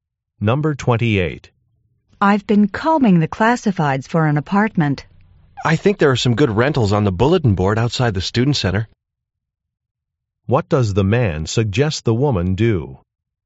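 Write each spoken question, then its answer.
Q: What does the man suggest the woman do?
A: Look at the bulletin board outside the student center.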